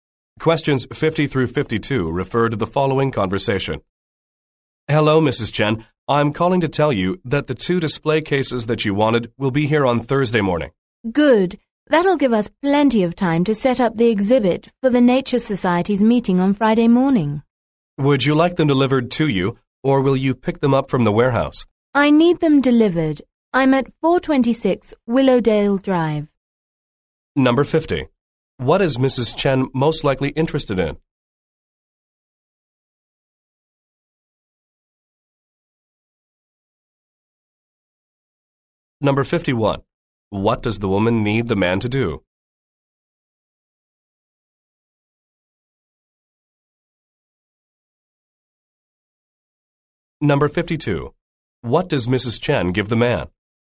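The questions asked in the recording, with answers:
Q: What is Mrs. Chen most likely interested in?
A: Display cases for an exhibit

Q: What does the woman need the man to do?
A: Deliver the display cases

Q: What does Mrs. Chen give the man?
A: Her address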